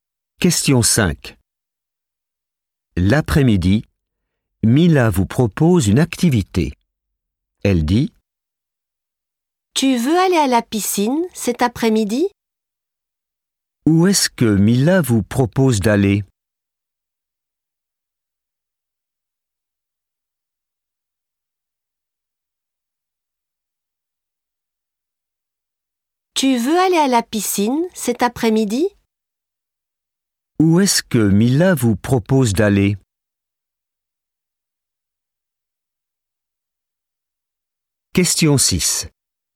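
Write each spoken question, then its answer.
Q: Où est-ce que Mila vous propose d'aller?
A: À la piscine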